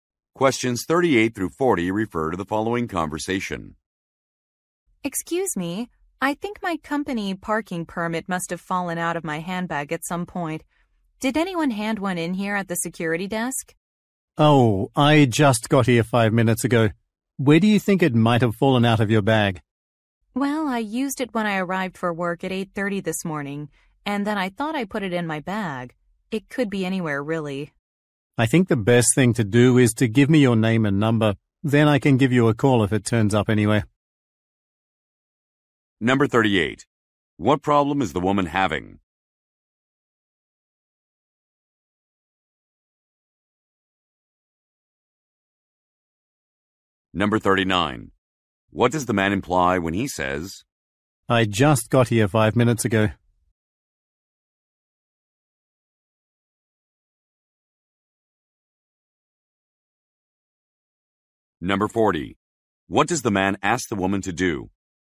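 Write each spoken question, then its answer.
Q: What problem is the woman having?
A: She lost her company parking permit

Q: What does the man imply when he says,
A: He doesn't know whether anyone handed in a permit

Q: What does the man ask the woman to do?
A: Give her name and phone number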